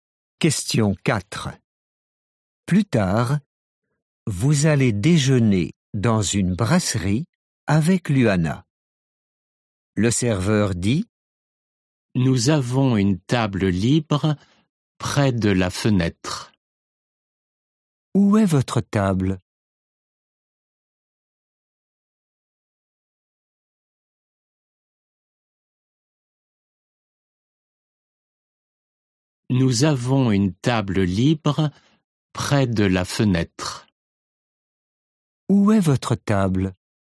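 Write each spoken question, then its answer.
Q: Où est votre table?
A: Près de la fenêtre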